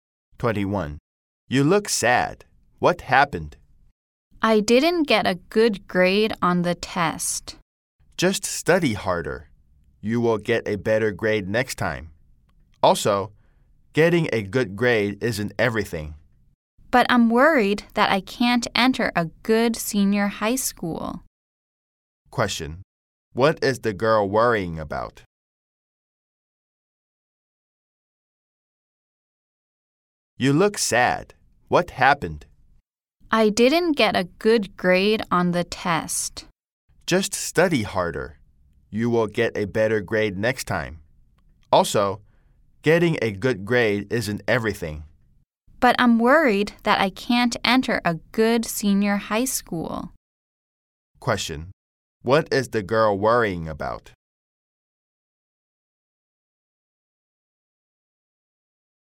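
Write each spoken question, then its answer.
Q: What is the girl worrying about?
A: That she can't get into a good senior high school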